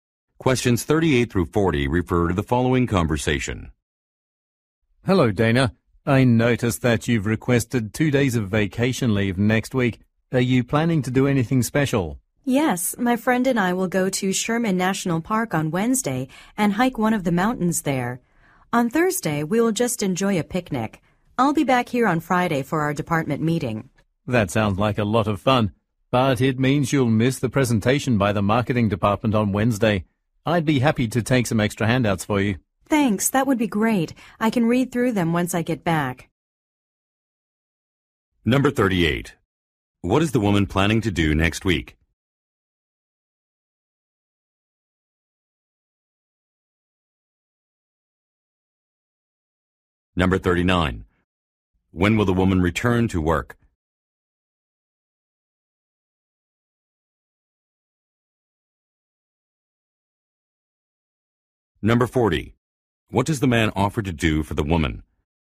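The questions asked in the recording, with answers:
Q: What is the woman planning to do next week?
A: Go hiking in Sherman National Park

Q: When will the woman return to work?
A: On Friday

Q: What does the man offer to do for the woman?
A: Take extra handouts for her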